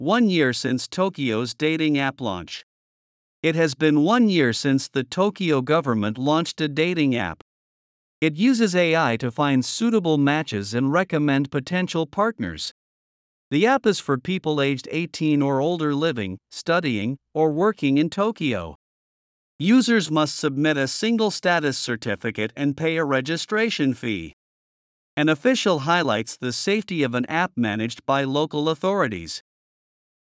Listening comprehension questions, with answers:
次の各質問の答えを探しながら聞きましょう。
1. How does the dating app use AI?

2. Who is the dating app for?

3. What does an official highlight?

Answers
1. It uses AI to find suitable matches and recommend potential partners.
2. The app is for people aged 18 or older living, studying, or working in Tokyo.
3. The official highlights the safety of an app managed by local authorities.

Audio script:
One Year Since Tokyo's Dating App Launch
It has been one year since the Tokyo government launched a dating app.
It uses AI to find suitable matches and recommend potential partners.
The app is for people aged 18 or older living, studying, or working in Tokyo.
Users must submit a single-status certificate and pay a registration fee.
An official highlights the safety of an app managed by local authorities.